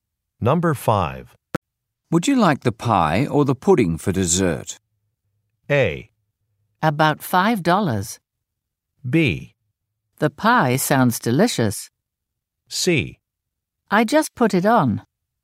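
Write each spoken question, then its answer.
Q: Would you like the pie or the pudding for dessert?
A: B: The pie sounds delicious.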